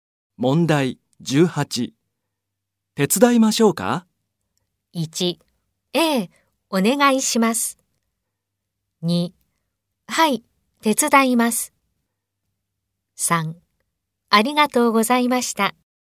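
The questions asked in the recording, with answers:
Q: 手伝いましょうか?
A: 1: ええ、お願いします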